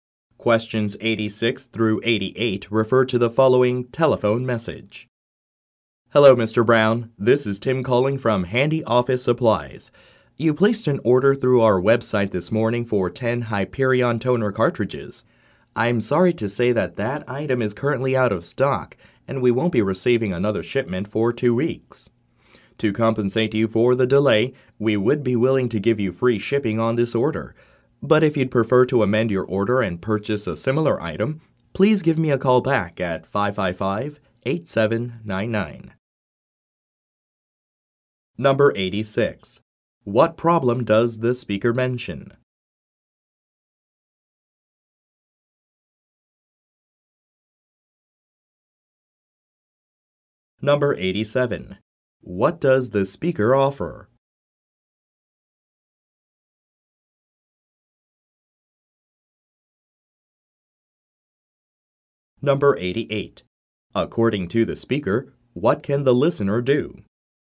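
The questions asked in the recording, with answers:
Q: What problem does the speaker mention?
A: The ordered item (toner cartridges) is out of stock

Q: What does the speaker offer?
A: Free shipping on the order

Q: According to the speaker, what can the listener do?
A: Call back to change the order and buy a similar item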